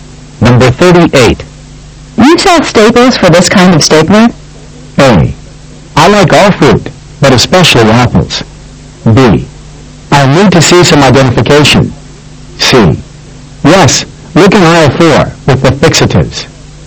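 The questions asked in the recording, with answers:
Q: You sell staples for this kind of stapler?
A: C: Yes, look in aisle 4 with the fixatives.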